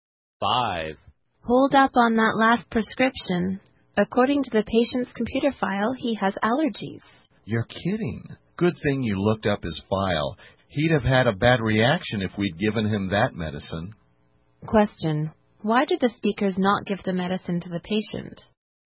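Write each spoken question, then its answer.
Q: why did the speakers not give the medicine to the patient?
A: His computer file showed he has allergies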